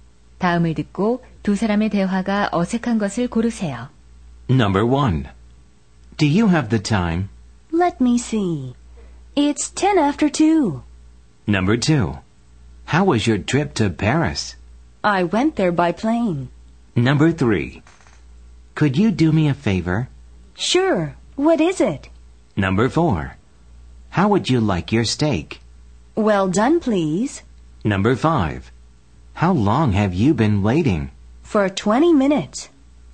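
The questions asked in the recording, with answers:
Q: 다음을 듣고 두 사람의 대화가 어색한 것을 고르세요.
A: 2: How was your trip to Paris? / I went there by plane.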